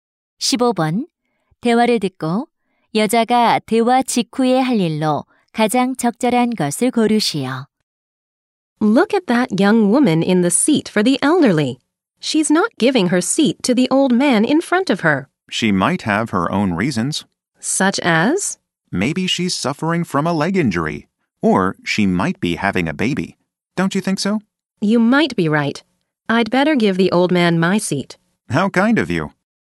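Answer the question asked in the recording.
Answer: 노인에게 자리 양보하기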